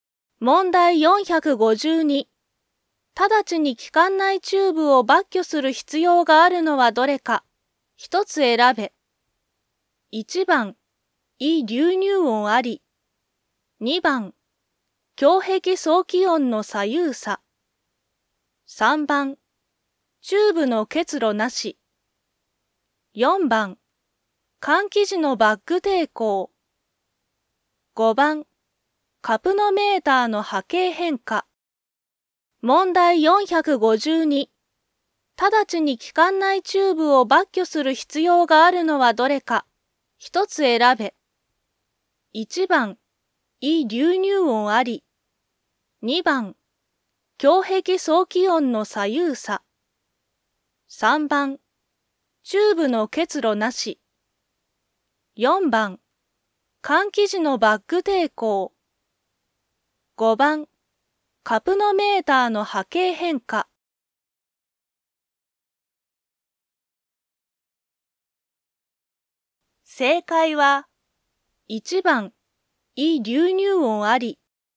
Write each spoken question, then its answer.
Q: 直ちに気管内チューブを抜去する必要があるのはどれか。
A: 正解は、1番、胃流入音あり。